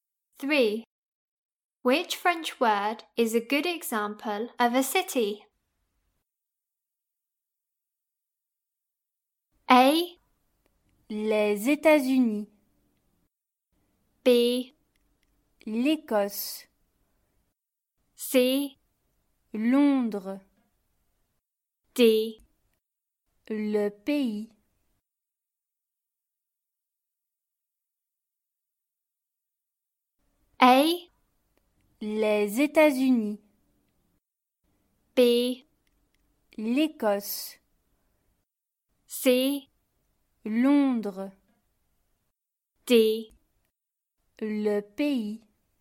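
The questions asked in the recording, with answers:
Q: Which French word is a good example of a city?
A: C: Londres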